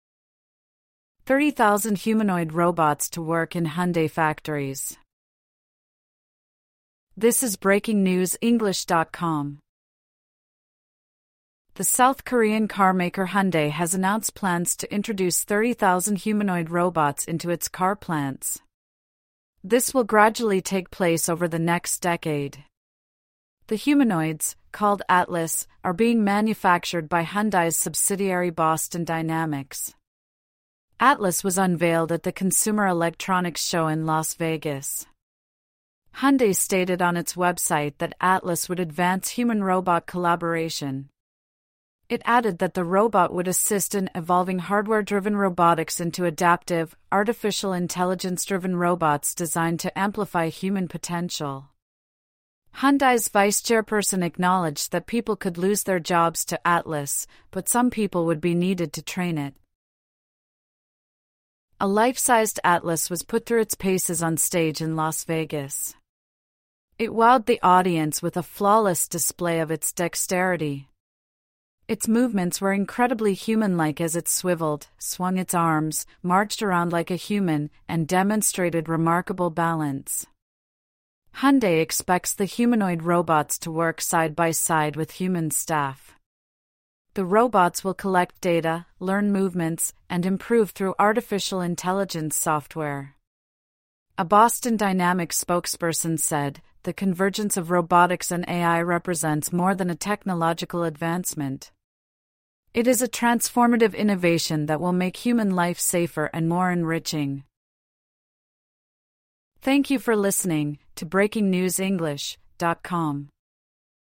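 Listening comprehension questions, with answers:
True / False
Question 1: Hyundai will put 30,000 humanoid robots in its plants starting in 2036.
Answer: F

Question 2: The company making the robots is a Hyundai subsidiary called Atlas.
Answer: F

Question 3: The robots were showcased at an electronics show in Las Vegas.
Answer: T

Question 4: Hyundai said the robots would not lead to any job losses.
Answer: F

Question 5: A robot was asked to pace up and down in a Las Vegas stage.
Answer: F

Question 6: The humanoid robots will work alongside humans in Hyundai's plants.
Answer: T

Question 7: AI software will help the robots learn and move.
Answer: T

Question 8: Hyundai said AI and robotics would enrich our lives.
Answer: F

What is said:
30,000 humanoid robots to work in Hyundai factories
Humanoid Robot Uprising
The South Korean car maker Hyundai has announced plans to introduce 30,000 humanoid robots into its car plants. 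This will gradually take place over the next decade. The humanoids (called Atlas) are being manufactured by Hyundai's subsidiary Boston Dynamics. Atlas was unveiled at the Consumer Electronics Show in Las Vegas. Hyundai stated on its website that Atlas would advance human-robot collaboration. It added that the robot would assist in "evolving hardware-driven robotics into adaptive, artificial intelligence-driven robots designed to amplify human potential". Hyundai's vice-chairperson acknowledged that people could lose their jobs to Atlas, but some people would be needed to train it.
A life-sized Atlas was put through its paces on stage in Las Vegas. It wowed the audience with a flawless display of its dexterity. Its movements were incredibly human-like as it swivelled, swung its arms, marched around like a human, and demonstrated remarkable balance. Hyundai expects the humanoid robots to work side by side with human staff. 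The robots will collect data, learn movements, and improve through artificial intelligence software. A Boston Dynamics spokesperson said: "The convergence of robotics and AI represents more than a technological advancement. It is a transformative innovation that will make human life safer and more enriching."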